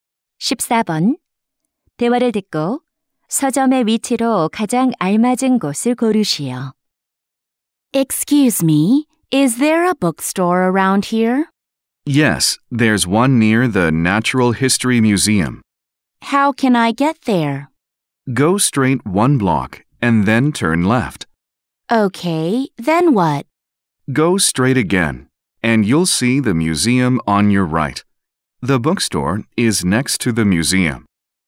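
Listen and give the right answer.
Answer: 자연사 박물관 옆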